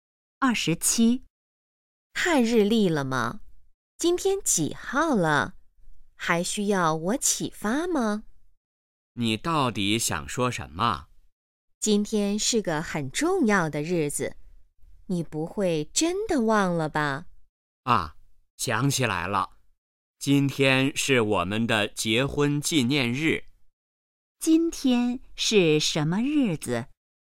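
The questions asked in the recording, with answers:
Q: 今天是什么日子?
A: 结婚纪念日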